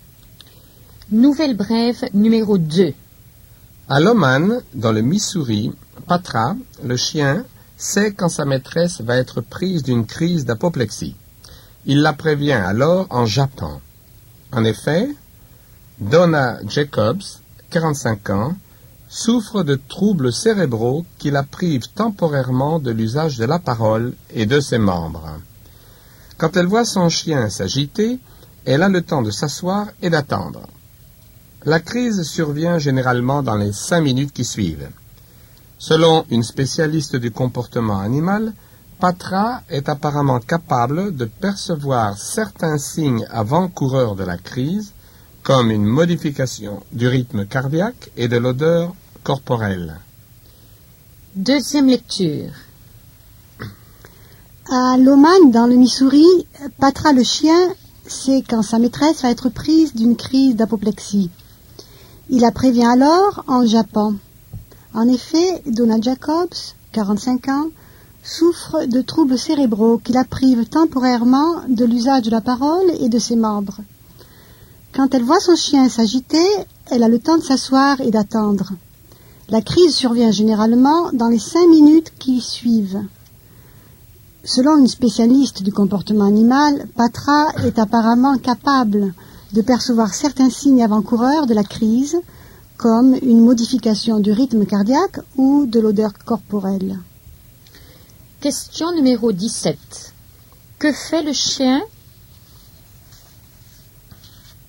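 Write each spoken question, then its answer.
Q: Que fait le chien ?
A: Il prévient sa maîtresse de ses crises en jappant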